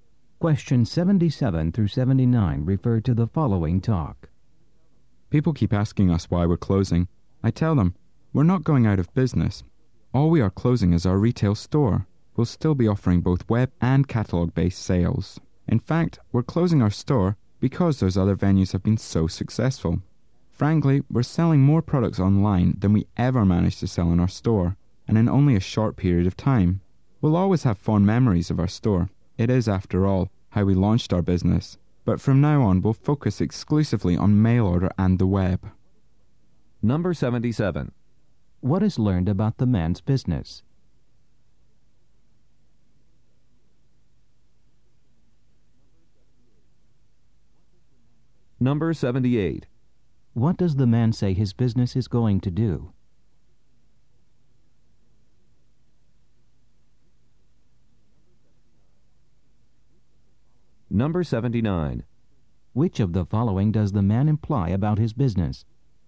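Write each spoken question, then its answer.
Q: What is learned about the man's business?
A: It is closing its retail store

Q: What does the man say his business is going to do?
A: Focus only on mail order and web sales

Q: Which of the following does the man imply about his business?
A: Its online sales are very successful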